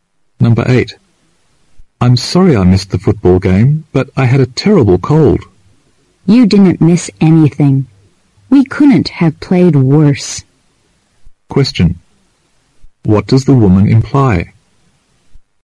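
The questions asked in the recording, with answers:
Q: What does the woman imply?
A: The team played very badly, so he missed nothing worth seeing.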